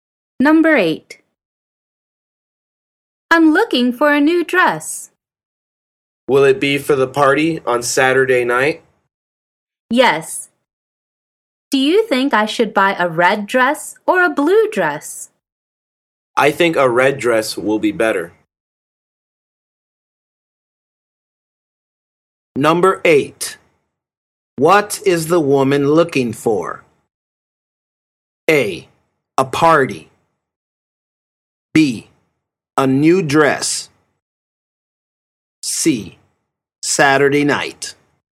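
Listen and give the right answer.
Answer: B: A new dress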